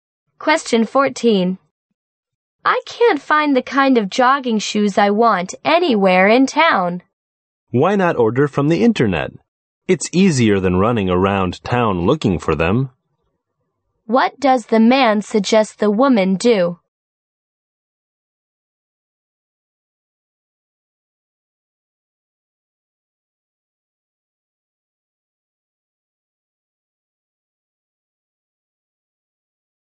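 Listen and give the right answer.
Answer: Order the jogging shoes from the internet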